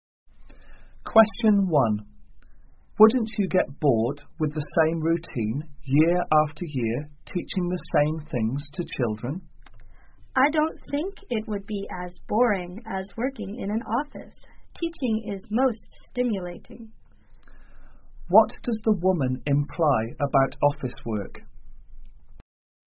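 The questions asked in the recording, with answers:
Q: What does the woman imply about office work?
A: It is boring, more boring than teaching.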